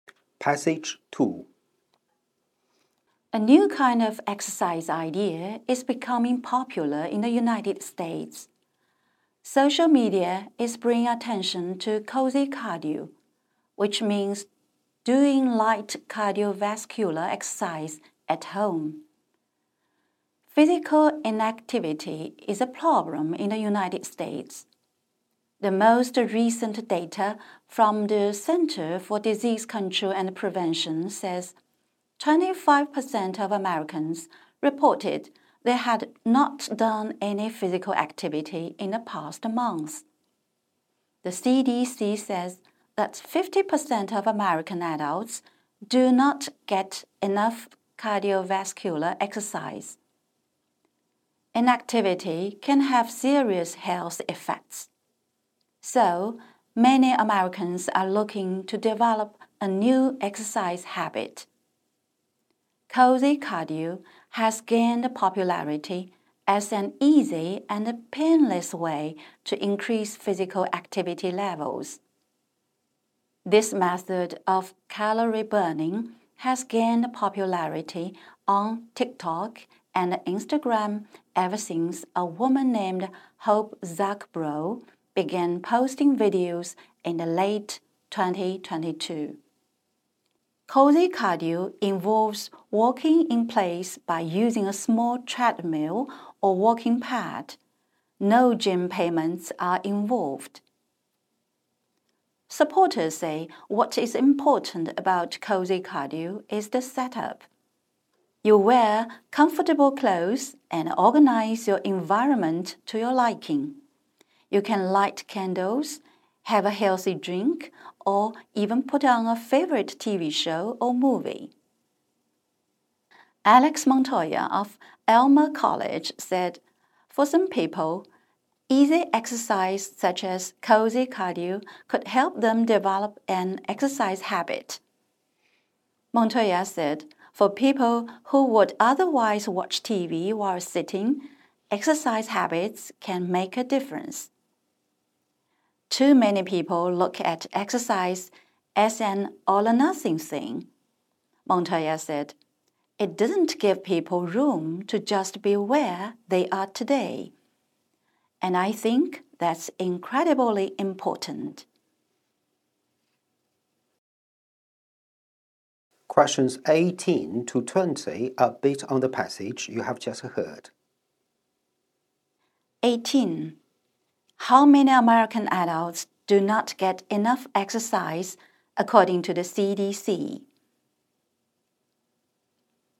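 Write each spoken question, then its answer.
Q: How many American adults do not get enough exercise, according to the CDC?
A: 50%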